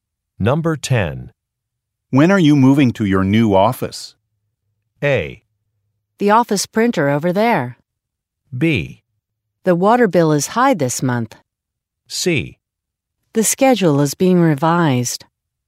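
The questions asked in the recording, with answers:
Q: When are you moving to your new office?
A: C: The schedule is being revised.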